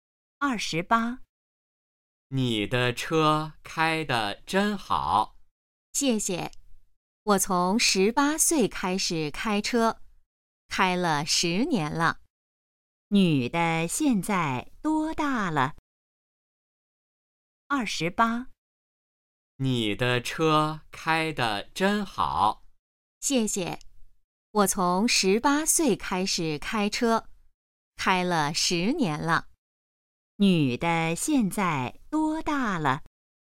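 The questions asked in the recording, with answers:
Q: 女的现在多大了?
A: 28岁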